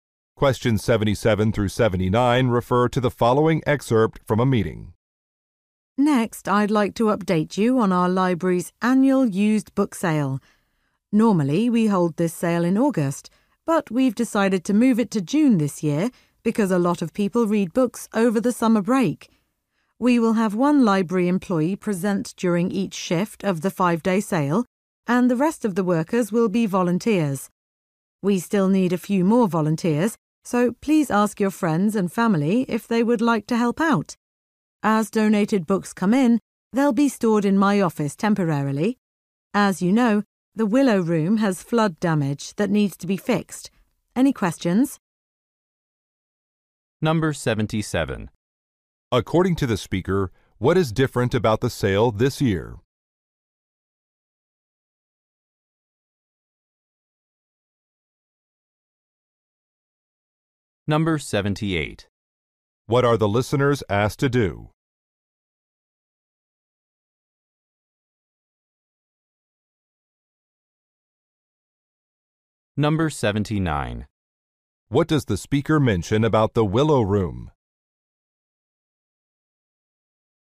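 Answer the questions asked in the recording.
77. It will be held in June instead of August
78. Ask friends and family to volunteer
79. It has flood damage that needs repairs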